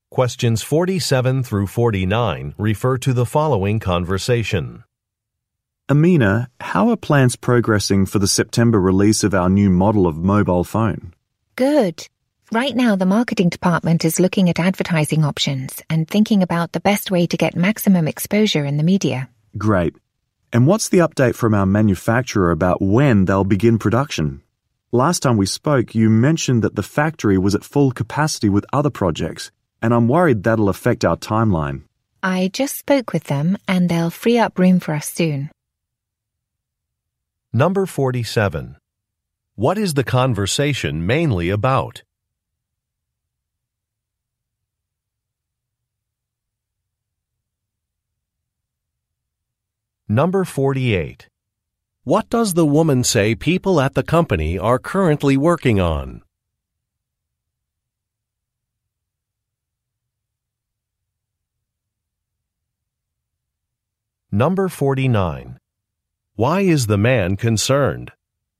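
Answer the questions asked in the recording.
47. Plans for releasing a new mobile phone model
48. Looking at advertising options for marketing
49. The factory is at full capacity, which could delay the timeline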